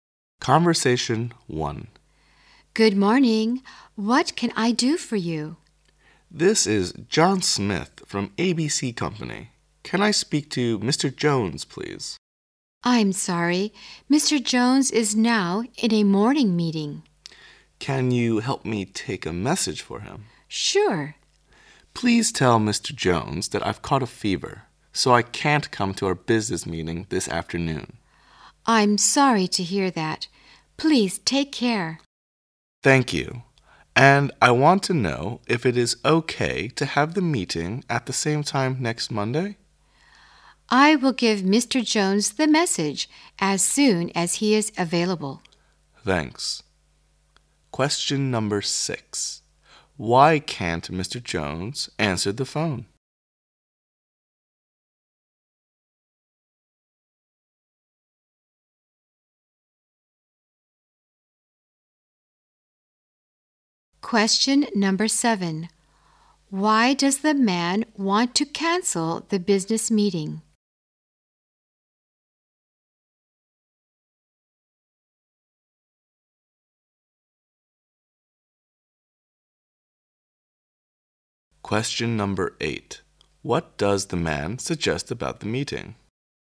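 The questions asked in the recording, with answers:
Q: Why can't Mr. Jones answer the phone?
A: He is in a morning meeting

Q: Why does the man want to cancel the business meeting?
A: He has caught a fever

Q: What does the man suggest about the meeting?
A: Have it at the same time next Monday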